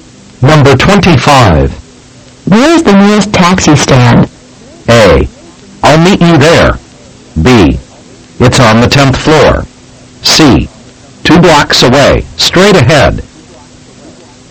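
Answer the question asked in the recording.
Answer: C: 2 blocks away, straight ahead.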